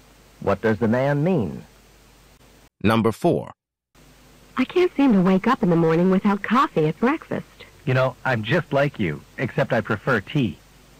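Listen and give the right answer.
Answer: He also needs a hot drink in the morning, but he drinks tea.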